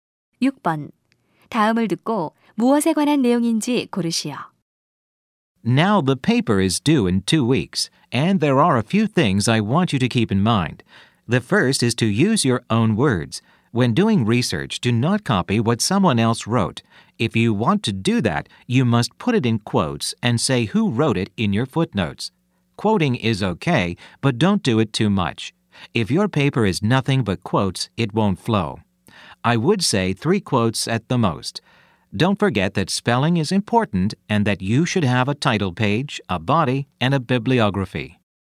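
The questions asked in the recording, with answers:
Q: 다음을 듣고 무엇에 관한 내용인지 고르시오.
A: 리포트 작성 시 유의사항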